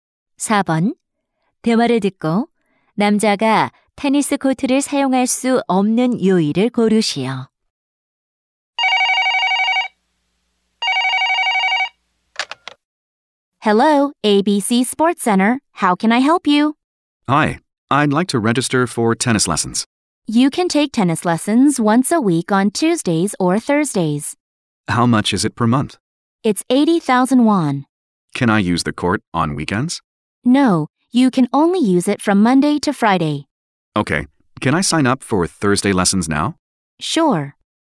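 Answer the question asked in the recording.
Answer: 주말(토요일, 일요일)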